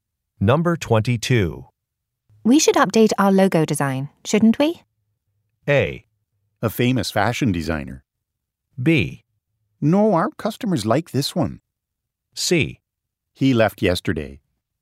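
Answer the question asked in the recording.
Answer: B: No, our customers like this one.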